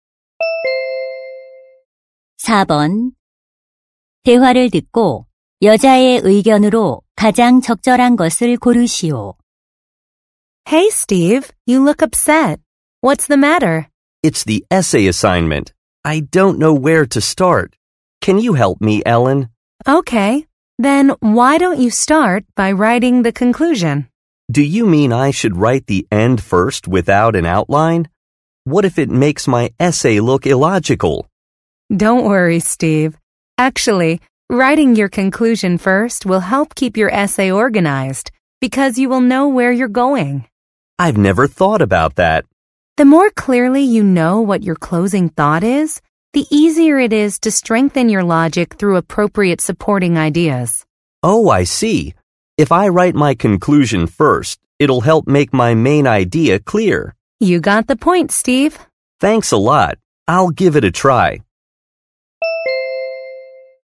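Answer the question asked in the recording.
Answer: 에세이를 쓸 때 결론을 먼저 쓰면 글을 체계적으로 구성하는 데 도움이 된다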